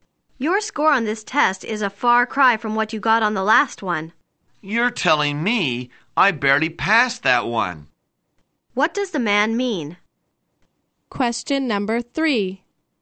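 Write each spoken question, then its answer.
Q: What does the man mean?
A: He did much better on this test than on the last one.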